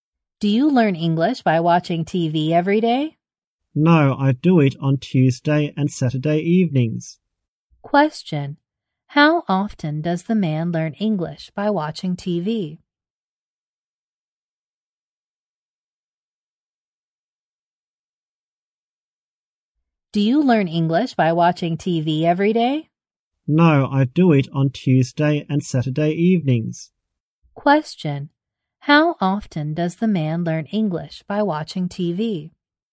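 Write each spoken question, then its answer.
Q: How often does the man learn English by watching TV?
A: Twice a week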